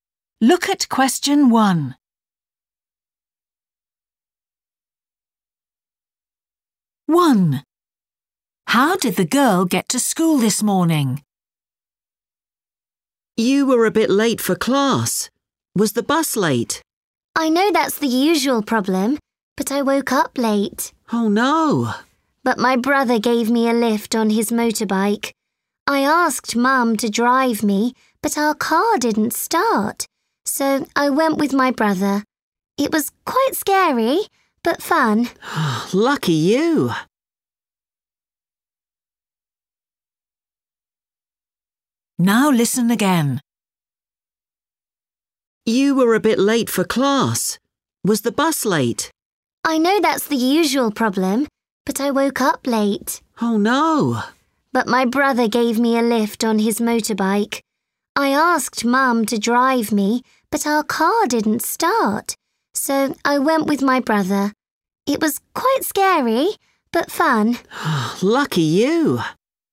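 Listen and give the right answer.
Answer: On her brother's motorbike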